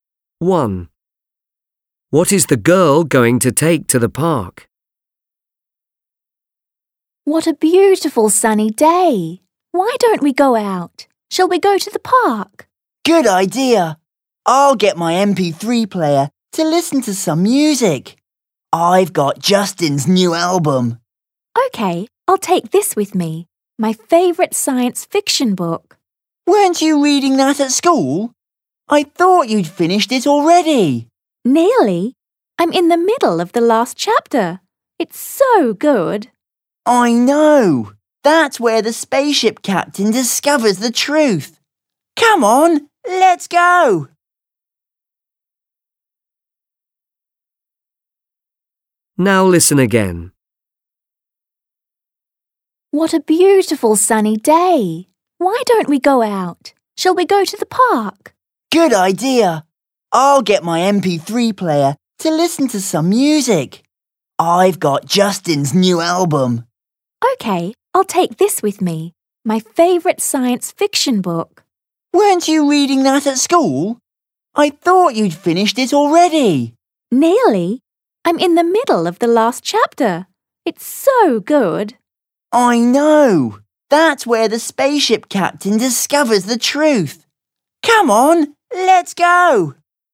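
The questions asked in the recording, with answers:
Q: What is the girl going to take to the park?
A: Her science fiction book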